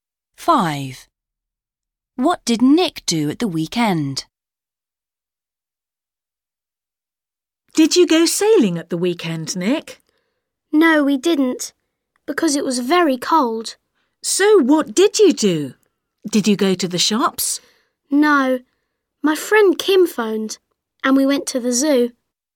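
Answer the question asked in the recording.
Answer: He went to the zoo.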